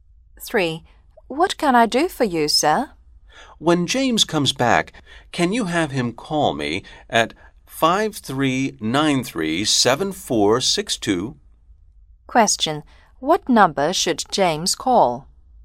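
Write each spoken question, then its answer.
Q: What number should James call?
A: 5393-7462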